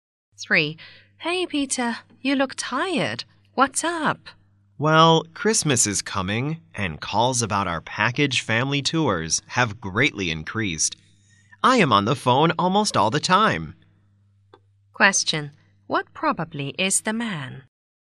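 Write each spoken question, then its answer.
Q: What probably is the man?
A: A travel agent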